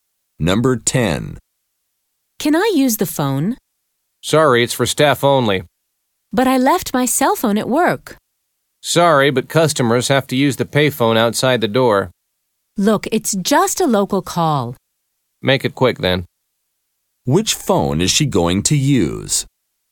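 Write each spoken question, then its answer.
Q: Which phone is she going to use?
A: The staff phone in the store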